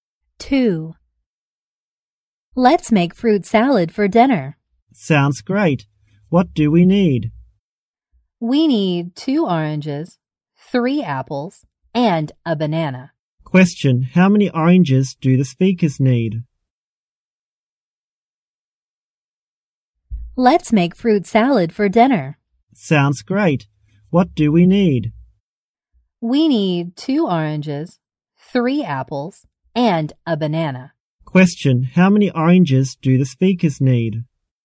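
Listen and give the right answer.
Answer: Two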